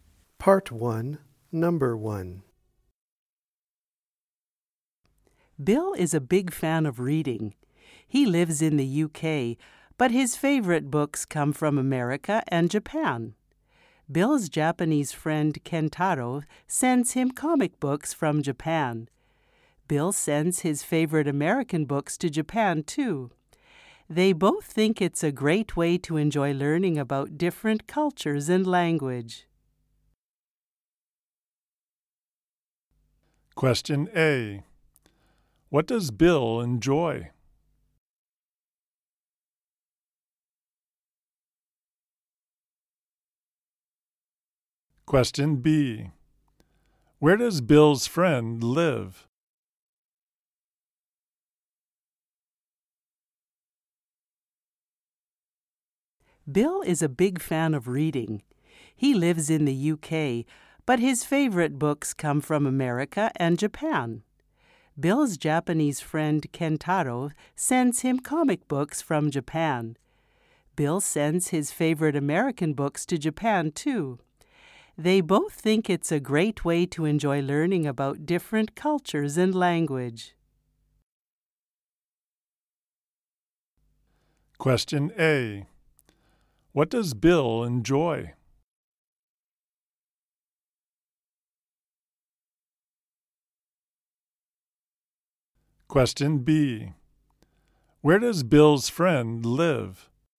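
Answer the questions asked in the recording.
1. Reading books
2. In Japan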